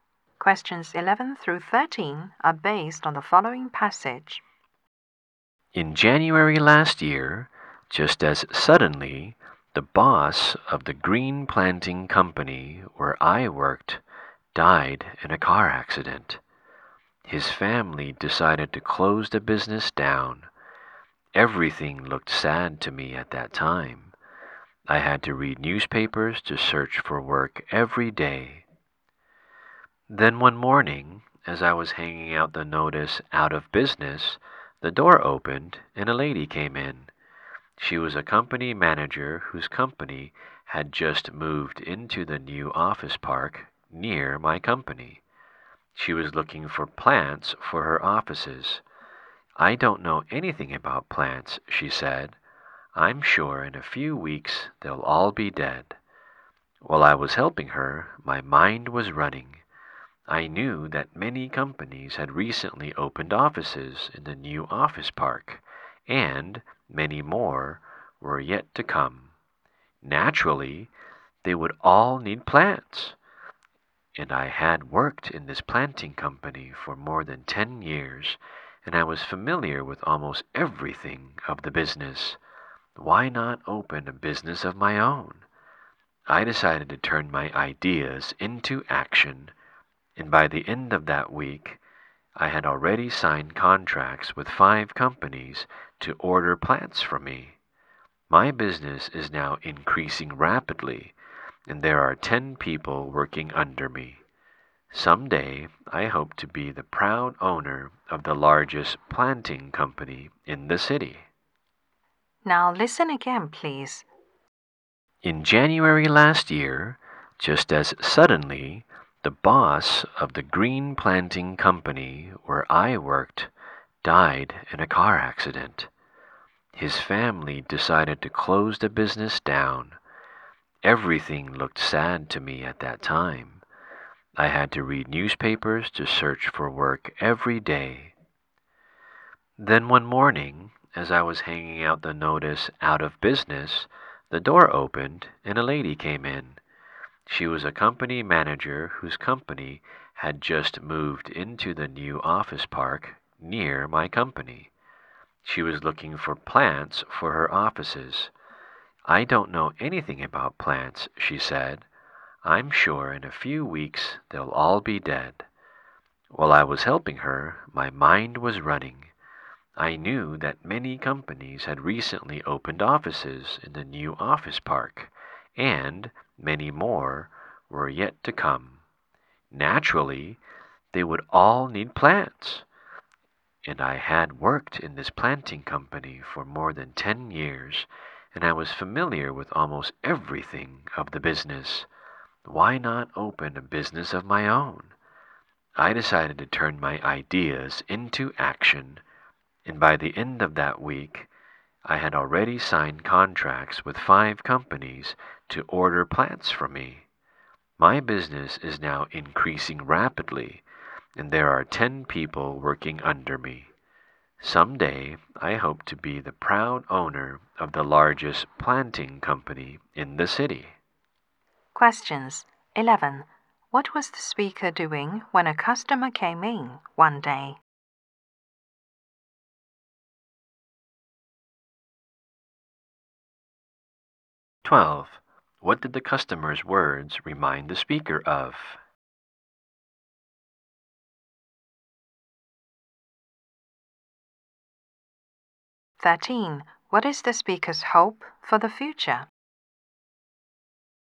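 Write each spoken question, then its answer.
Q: What was the speaker doing when a customer came in one day?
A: Hanging out the out-of-business notice

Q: What is the speaker's hope for the future?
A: To own the largest planting company in the city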